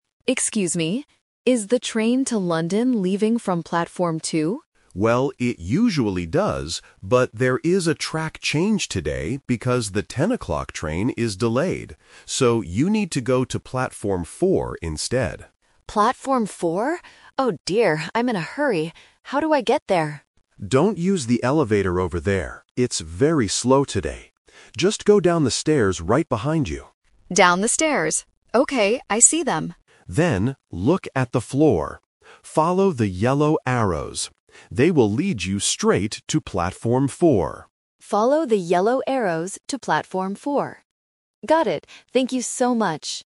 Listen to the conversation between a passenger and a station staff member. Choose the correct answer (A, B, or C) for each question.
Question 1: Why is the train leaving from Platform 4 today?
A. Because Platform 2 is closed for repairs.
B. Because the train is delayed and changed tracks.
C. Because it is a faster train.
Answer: Because the train is delayed and changed tracks.

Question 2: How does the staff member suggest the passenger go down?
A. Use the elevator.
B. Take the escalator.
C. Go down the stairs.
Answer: Go down the stairs.

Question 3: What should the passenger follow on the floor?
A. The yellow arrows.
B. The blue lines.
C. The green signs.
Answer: The yellow arrows.

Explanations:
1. The staff explains the "twist": "...there is a track change today because the 10 o'clock train is delayed." The Trap: Option (A) is a common distractor in directions but not mentioned. Option (C) is a plausible guess but not in the audio.
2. The staff says clearly: "Just go down the stairs right behind you." The Trap: Option (A) is the trap. The staff mentions the elevator but says "Don't use the elevator; it's very slow."
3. The instruction is specific: "Follow the yellow arrows." The Trap: Options (B) and (C) mention different colors/types of signs which are typical distractors in A2 listening tests to see if students recognize the correct color adjective.

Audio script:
Passenger: Excuse me! Is the train to London leaving from Platform 2?
Staff: Well, it usually does, but there is a track change today because the 10 o'clock train is delayed. So, you need to go to Platform 4 instead.
Passenger: Platform 4? Oh dear, I'm in a hurry. How do I get there?
Staff: Don't use the elevator over there; it's very slow today. Just go down the stairs right behind you.
Passenger: Down the stairs. Okay, I see them.
Staff: Then, look at the floor. Follow the yellow arrows. They will lead you straight to Platform 4.
Passenger: Follow the yellow arrows to Platform 4. Got it! Thank you so much!

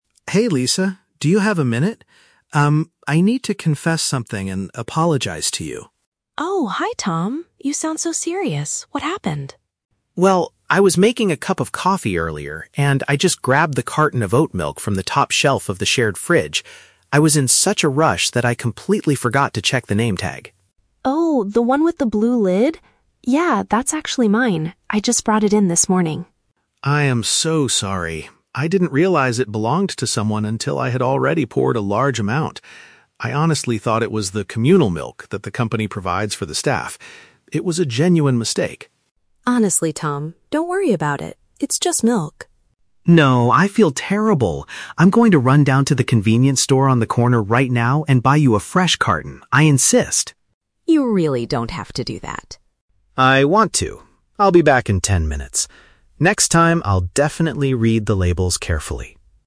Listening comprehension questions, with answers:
Listen to the conversation between two coworkers and choose the correct answer (A, B, or C).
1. What mistake did Tom make in the breakroom?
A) He threw away a colleague's coffee mug by accident.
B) He consumed someone else's personal beverage.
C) He forgot to put the communal milk back in the refrigerator.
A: He consumed someone else's personal beverage.

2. Why did Tom use Lisa's item?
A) He assumed the management had purchased it for everyone to share.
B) He could not clearly read the handwriting on the sticky note.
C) He believed he had bought that exact same brand the day before.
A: He assumed the management had purchased it for everyone to share.

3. How is Tom going to fix the situation?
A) By giving Lisa some cash for the portion he used.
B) By bringing his own milk to share with her tomorrow.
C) By purchasing a brand-new replacement from a nearby shop.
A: By purchasing a brand-new replacement from a nearby shop.

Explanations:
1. Tom admits he "grabbed the carton of oat milk" and "poured a large amount," which belonged to Lisa. Option B accurately paraphrases this as consuming someone else's "personal beverage." Why the trap is wrong: Option (A) is a trap. The word "coffee" is mentioned because he was making coffee, but he didn't throw away a mug. Option (C) is a trap. The words "communal milk" and "fridge" are in the audio, but his mistake was drinking Lisa's milk, not forgetting to put the communal one back.
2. Tom explains, "I honestly thought it was the communal milk that the company provides for the staff." Option A uses synonyms to express this idea (management purchased it for everyone to share). Why the trap is wrong: Option (B) is a trap. Tom mentions the "name tag" and "labels," but he says he "forgot to check" them, not that he couldn't read the handwriting. Option (C) is a plausible excuse for a mix-up, but he never says he bought the same brand.
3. Tom insists he will "run down to the convenience store" (nearby shop) and "buy you a fresh carton" (brand-new replacement). Why the trap is wrong: Option (A) is a trap. He feels terrible and insists on paying for his mistake, but he wants to buy a new carton, not just give her cash. Option (B) is a trap because he promises to go to the store "right now," not bring something "tomorrow."

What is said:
Tom: Hey Lisa, do you have a minute? Um, I need to confess something and apologize to you.
Lisa: Oh, hi Tom. You sound so serious. What happened?
Tom: Well, I was making a cup of coffee earlier, and I just grabbed the carton of oat milk from the top shelf of the shared fridge. I was in such a rush that I completely forgot to check the name tag.
Lisa: Oh, the one with the blue lid? Yeah, that's actually mine. I just brought it in this morning.
Tom: I am so sorry! I didn't realize it belonged to someone until I had already poured a large amount. I honestly thought it was the communal milk that the company provides for the staff. It was a genuine mistake.
Lisa: Honestly, Tom, don't worry about it. It's just milk.
Tom: No, I feel terrible. I'm going to run down to the convenience store on the corner right now and buy you a fresh carton. I insist.
Lisa: You really don't have to do that.
Tom: I want to. I'll be back in ten minutes. Next time, I'll definitely read the labels carefully!

